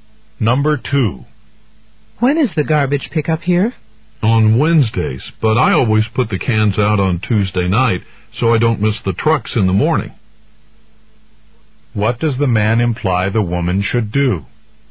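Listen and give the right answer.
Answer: Put the garbage cans out on Tuesday night.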